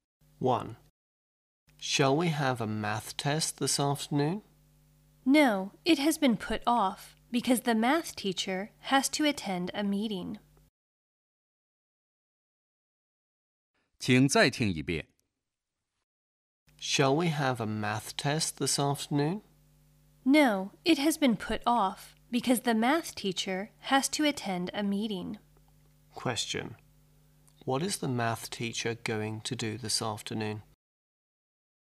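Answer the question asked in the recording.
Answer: Attend a meeting.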